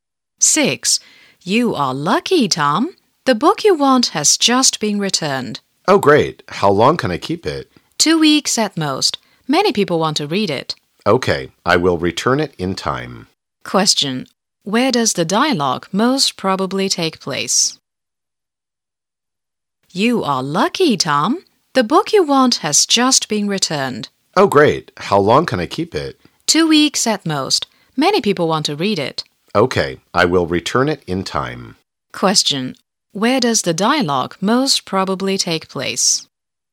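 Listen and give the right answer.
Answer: In a library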